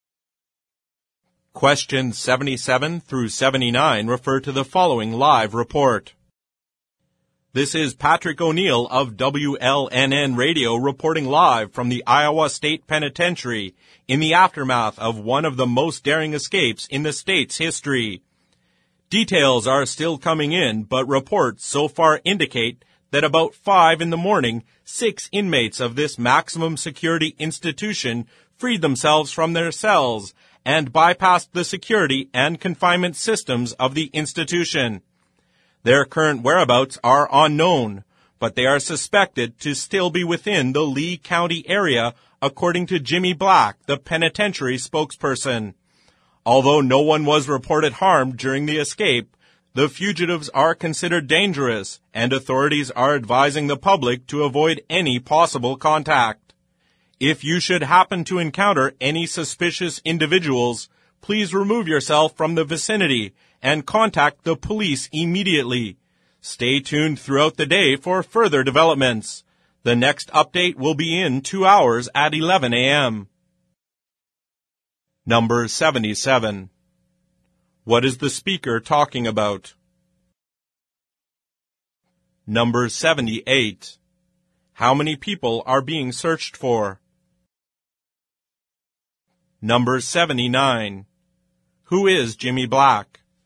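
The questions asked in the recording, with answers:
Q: What is the speaker talking about?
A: An escape of prisoners from the Iowa State Penitentiary

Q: How many people are being searched for?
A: Six

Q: Who is Jimmy Black?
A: The penitentiary spokesperson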